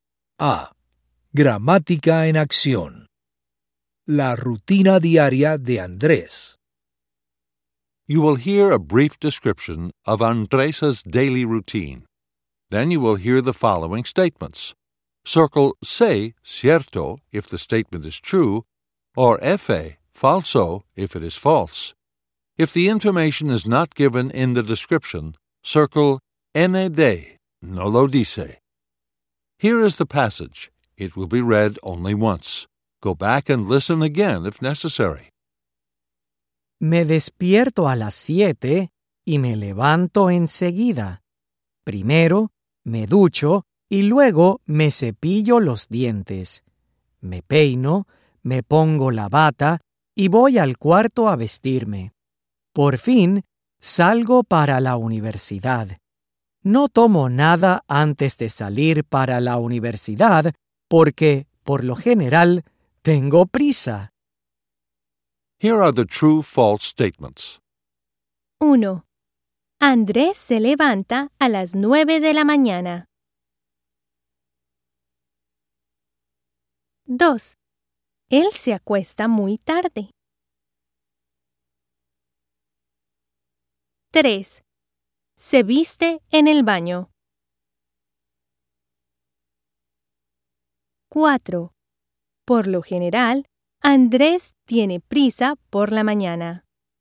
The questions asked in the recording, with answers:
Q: Andrés se levanta a las 9 de la mañana.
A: F-A

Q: Él se acuesta muy tarde.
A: N-A-D

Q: Se viste en el baño.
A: F-A